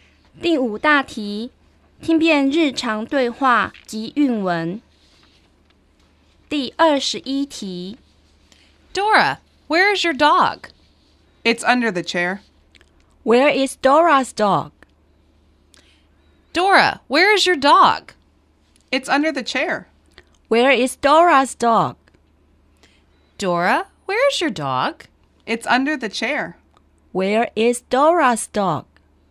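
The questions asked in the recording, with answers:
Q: Where is Dora's dog?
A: Under the chair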